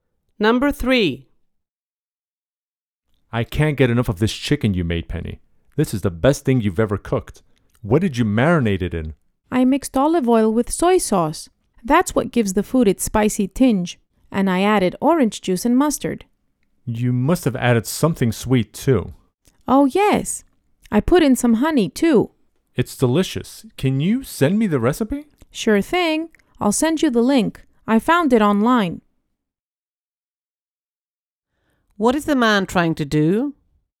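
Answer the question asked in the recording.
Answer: Get the recipe for the chicken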